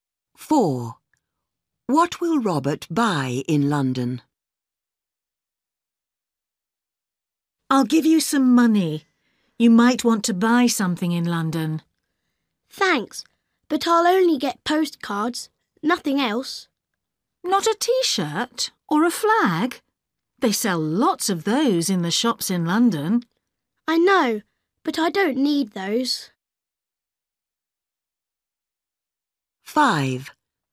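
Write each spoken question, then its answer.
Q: What will Robert buy in London?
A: Postcards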